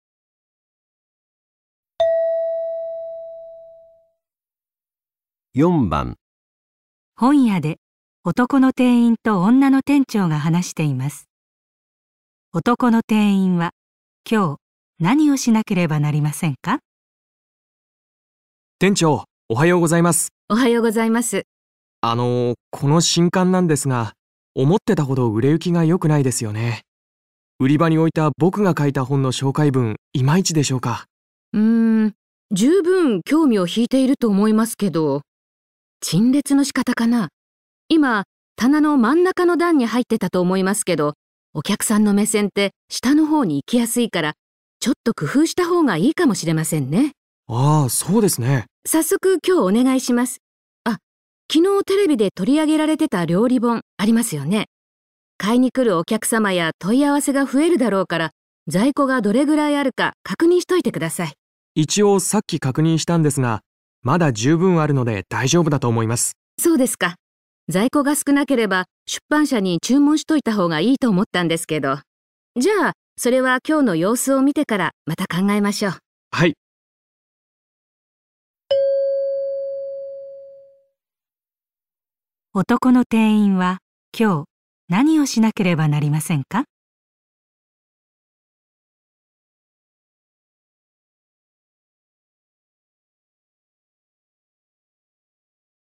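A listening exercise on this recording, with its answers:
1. 男の店員は今日、何をしなければなりませんか?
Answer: 新刊を並べる場所を変える

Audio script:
今、棚の真ん中の段に入ってたと思いますけど、お客さんの目線って下の方に行きやすいからちょっと工夫した方がいいかもしれませんね。
男の店員:あぁ〜そうですね。
女の店長:さっそく今日お願いします。あっ、昨日テレビで取り上げられてた料理本ありますよね?買いにくるお客様や問い合わせが増えるだろうから、在庫がどれくらいあるか確認しといてください。
男の店員:一応さっき確認したんですが、まだ十分あるので大丈夫だと思います。
女の店長:そうですか。在庫が少なければ出版社に注文しといた方がいいと思ったんですけど。じゃあ、それは今日の様子を見てからまた考えましょう。
男の店員:はい。
問題:男の店員は今日何をしなければなりませんか?

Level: N1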